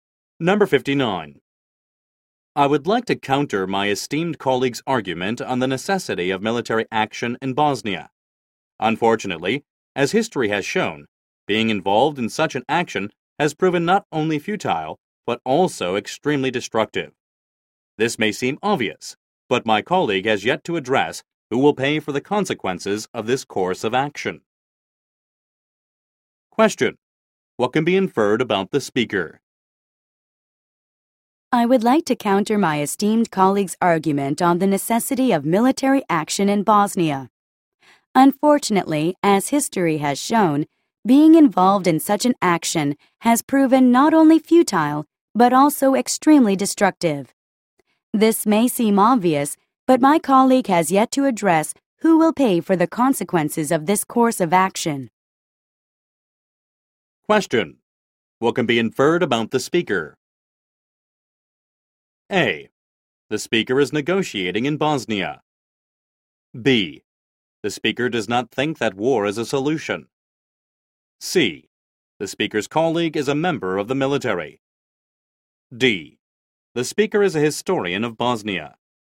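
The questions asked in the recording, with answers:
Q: What can be inferred about the speaker?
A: B: The speaker does not think that war is a solution.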